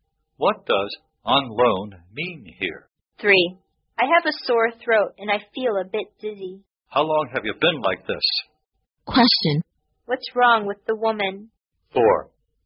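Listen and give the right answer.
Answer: She has a sore throat and feels dizzy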